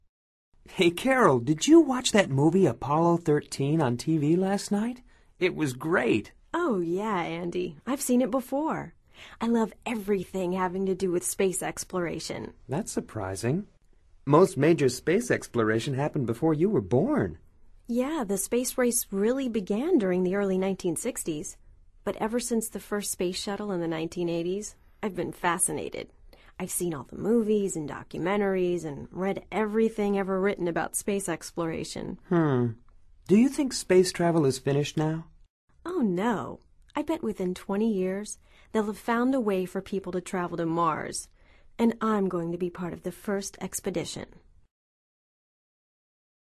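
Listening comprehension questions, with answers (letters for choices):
Escucha atentamente esta conversación entre Andy y Carol y selecciona la respuesta más adecuada de acuerdo con tu comprensión auditiva. No verifiques las respuestas de este ejercicio hasta finalizarlo.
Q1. The space race began ...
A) within 20 years.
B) in the 1970s.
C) during the 1960s.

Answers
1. C

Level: Nivel Avanzado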